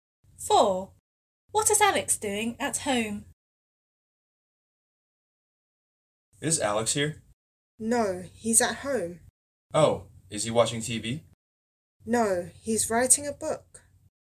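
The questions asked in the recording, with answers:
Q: What is Alex doing at home?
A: writing a book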